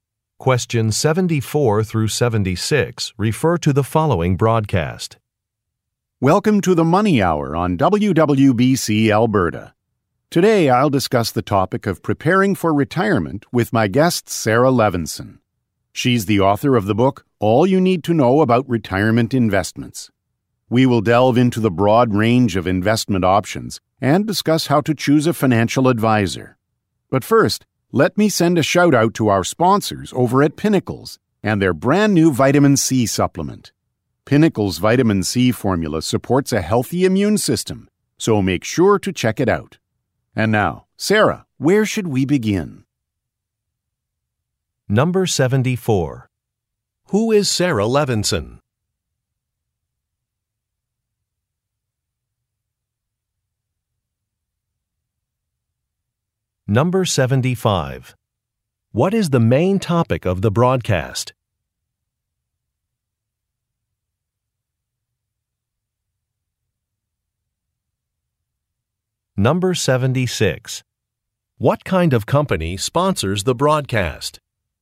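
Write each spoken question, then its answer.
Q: Who is Sarah Levinson?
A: An author

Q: What is the main topic of the broadcast?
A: Preparing for retirement

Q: What kind of company sponsors the broadcast?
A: A vitamin supplement maker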